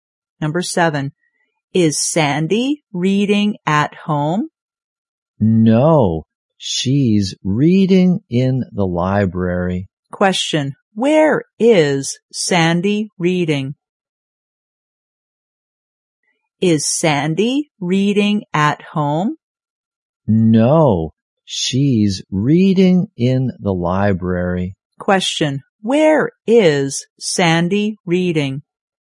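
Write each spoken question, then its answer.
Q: where is Sandy reading?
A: In the library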